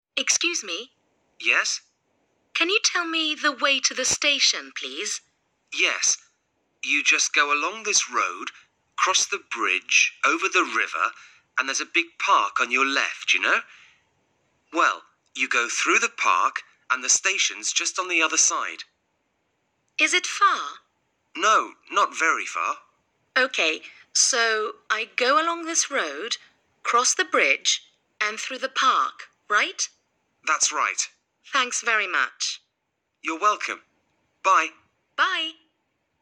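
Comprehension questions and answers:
Listen to the text and fill in the gaps:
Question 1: me the way to the station,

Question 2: - Yes, you just along this road, cross the bridge over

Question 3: along this road, cross the bridge over and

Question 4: a big park on your left, you know? Well, you go through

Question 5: and the station is just on the other side.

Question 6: the bridge and through the park –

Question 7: the bridge and through the park – ?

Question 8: - That's right. - .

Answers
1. Can you tell
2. go
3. the river
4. there's
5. the park
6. cross
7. right
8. Thanks very much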